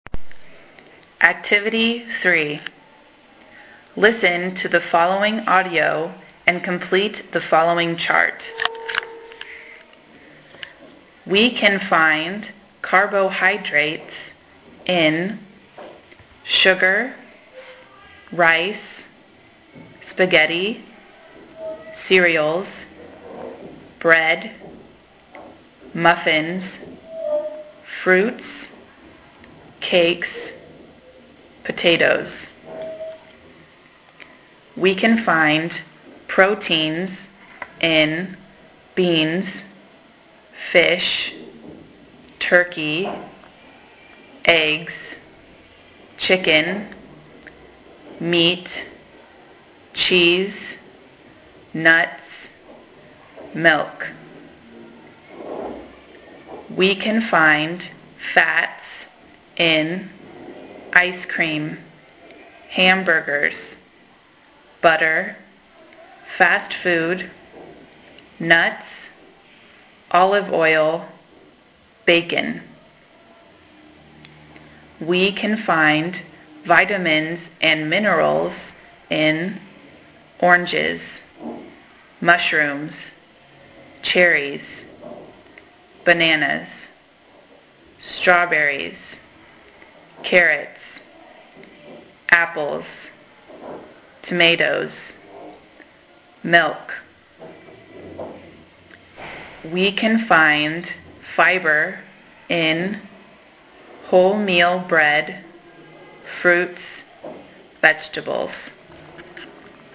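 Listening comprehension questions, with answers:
Activity 3: Listen and complete:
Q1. -We can find _____________in foods such as: ______________________________________________________________________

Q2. We can find _____________in foods such as: _________________________________________________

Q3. - We can find _____________in foods such as:__________________________________________________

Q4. - We can find _____________in foods such as: __________________ ____________________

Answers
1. proteins; beans, fish, turkey, eggs, chicken, meat, cheese, nuts, milk
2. fats; ice cream, hamburgers, butter, fast food, nuts, olive oil, bacon
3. vitamins and minerals; oranges, mushrooms, cherries, bananas, strawberries, carrots, apples, tomatoes, milk
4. fibre; wholemeal bread, fruits, vegetables

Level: 5o de Primaria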